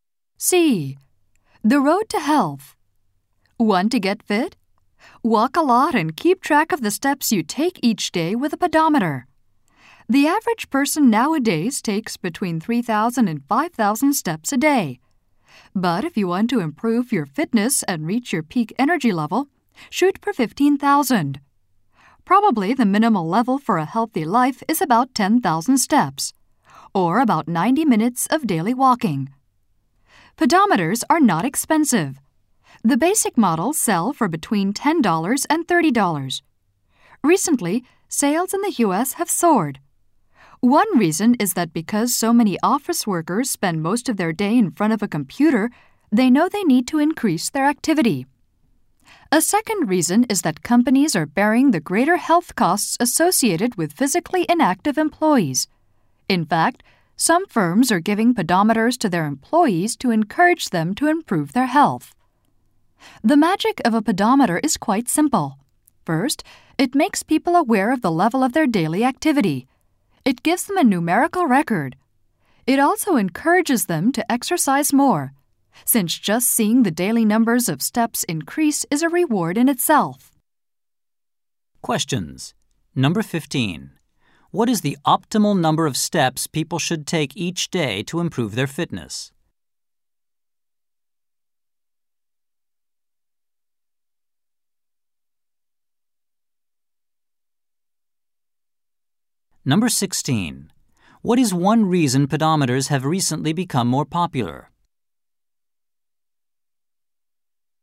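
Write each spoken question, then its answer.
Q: What is the optimal number of steps people should take each day to improve their fitness?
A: 15,000 steps

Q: What is one reason pedometers have recently become more popular?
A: Office workers who sit at computers all day know they need to be more active.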